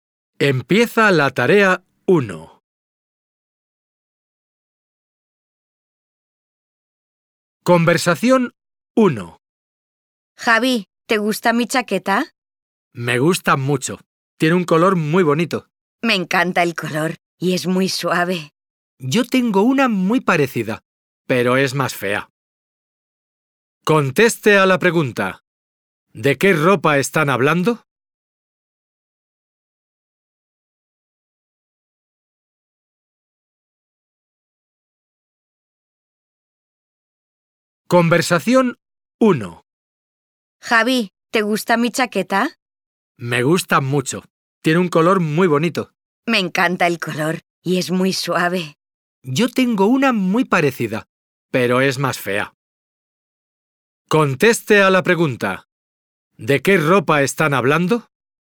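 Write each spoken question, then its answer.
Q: ¿De qué ropa están hablando?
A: De una chaqueta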